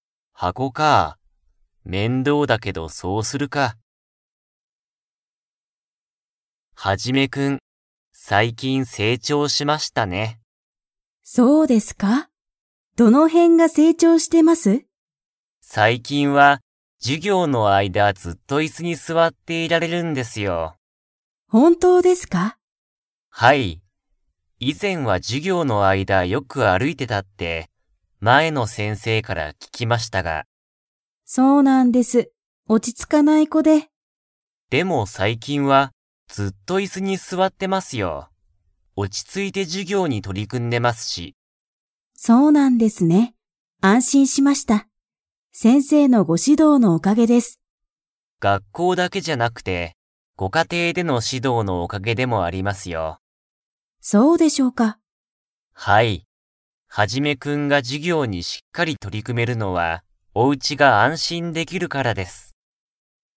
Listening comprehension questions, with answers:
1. ハジメは以前いぜん、授業じゅぎょう中ちゅうに何なにをしていましたか?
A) 本ほんを読よんでた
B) 椅子いすに座すわってた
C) 友達ともだちと話はなしてた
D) 歩あるいてた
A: 歩あるいてた

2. お母かあさんは今日きょう、 。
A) 安心あんしんした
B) 安心あんしんしなかった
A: 安心あんしんした

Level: Level 4

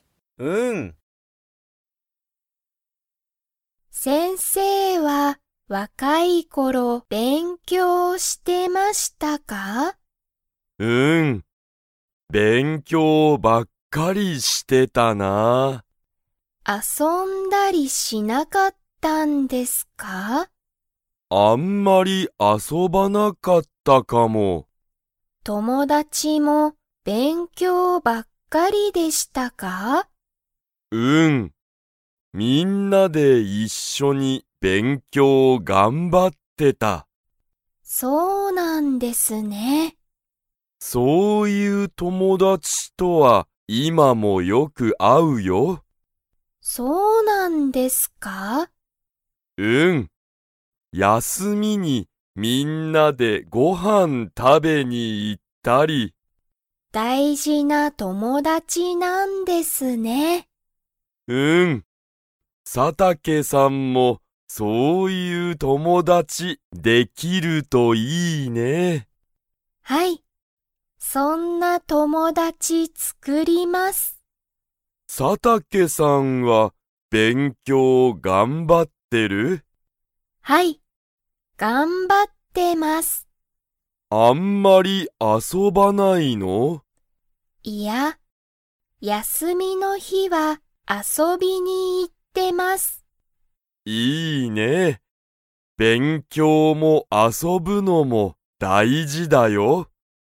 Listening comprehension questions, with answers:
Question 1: 先生(せんせい)は、若(わか)い頃(ころ)たくさん遊(あそ)びましたか?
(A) はい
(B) いいえ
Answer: いいえ

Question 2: 佐竹(さたけ)さんも、____友達(ともだち)を作(つく)りたい。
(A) 楽(たの)しい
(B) 若わかい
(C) 大事(だいじ)な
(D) 早(はや)い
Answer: 大事(だいじ)な

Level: Level 2

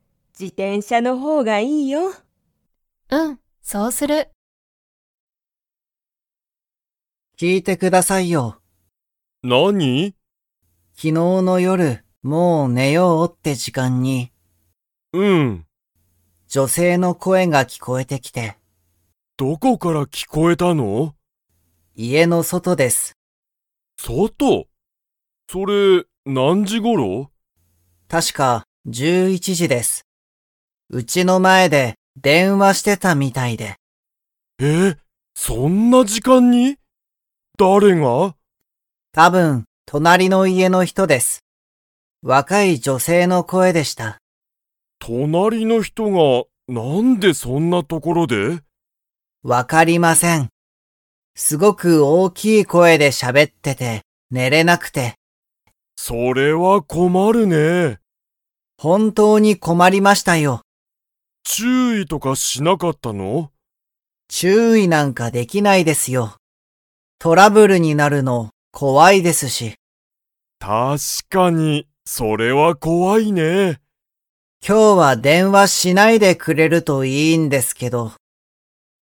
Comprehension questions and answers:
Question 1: 昨日きのうの夜よる、どこから女性じょせいの声こえが聞きこえてきましたか?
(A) 家いえの外そと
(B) 家いえの中なか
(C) 会社かいしゃの外そと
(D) 会社かいしゃの中なか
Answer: 家いえの外そと

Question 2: 太田おおたさんは、女性じょせいに 。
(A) 注意ちゅういできた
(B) 注意ちゅういできなかった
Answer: 注意ちゅういできなかった

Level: Level 3

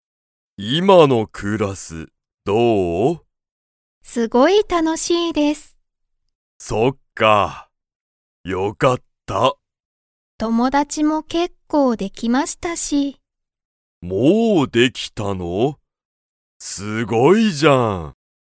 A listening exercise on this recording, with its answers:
リカは友達ともだちが____。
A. 結構けっこうできた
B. 全然ぜんぜんできない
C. ちょっといる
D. いない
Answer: 結構けっこうできた

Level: Level 1

